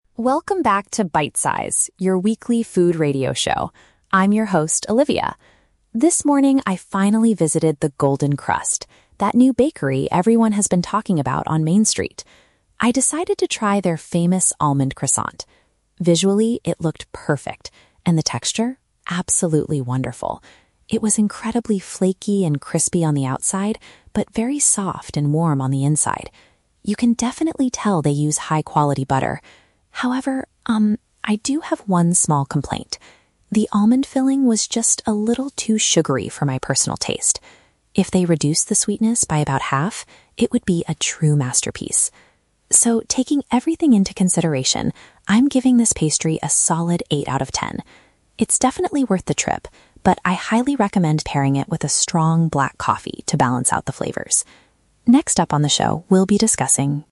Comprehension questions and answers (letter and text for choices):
Listen to a food critic reviewing a pastry on a radio show. Choose the correct answer (A, B, or C).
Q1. How does the critic describe the outside of the croissant?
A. It was soft and warm.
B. It was dry and hard.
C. It was very crispy.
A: C. It was very crispy.

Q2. What was the critic's main complaint about the pastry?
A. It contained too much sugar.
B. It was made with cheap butter.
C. It did not have enough almond filling.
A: A. It contained too much sugar.

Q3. What does the critic suggest listeners do if they buy the pastry?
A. Ask the baker to make it less sweet.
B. Drink some strong coffee with it.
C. Give it a rating of eight out of ten.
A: B. Drink some strong coffee with it.

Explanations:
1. The critic describes the texture as "incredibly flaky and crispy on the outside."
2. The critic states that the filling was "a little too sugary" for her taste and wishes they "reduced the sweetness". "Too sugary" is a B1 paraphrase for containing too much sugar.
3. At the end of the review, the critic says, "I highly recommend pairing it with a strong, black coffee to balance out the flavors." To "pair" something with food means to eat or drink them together.

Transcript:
Olivia: Welcome back to Bite Size, your weekly food radio show. I'm your host, Olivia. This morning, I finally visited The Golden Crust, that new bakery everyone has been talking about on Main Street. I decided to try their famous almond croissant. Visually, it looked perfect. And the texture? Absolutely wonderful. It was incredibly flaky and crispy on the outside, but very soft and warm on the inside. You can definitely tell they use high-quality butter. However, um, I do have one small complaint. The almond filling was just a little too sugary for my personal taste. If they reduced the sweetness by about half, it would be a true masterpiece. So, taking everything into consideration, I'm giving this pastry a solid eight out of ten. It's definitely worth the trip, but I highly recommend pairing it with a strong, black coffee to balance out the flavors. Next up on the show, we'll be discussing...